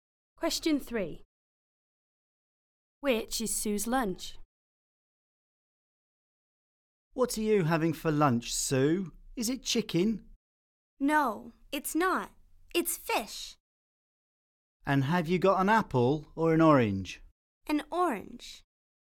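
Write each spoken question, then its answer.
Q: Which is Sue's lunch?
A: Fish and an orange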